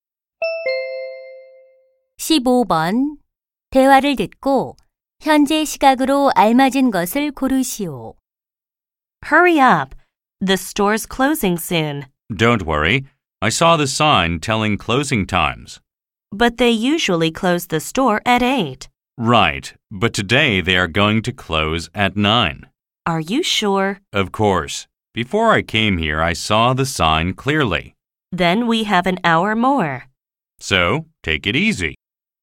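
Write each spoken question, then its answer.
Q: 대화를 듣고 현재 시각으로 알맞은 것을 고르시오.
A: 8시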